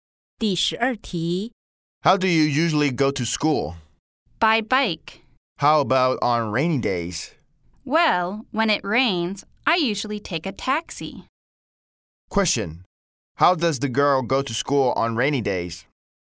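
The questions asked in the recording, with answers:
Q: How does the girl go to school on rainy days?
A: She usually takes a taxi.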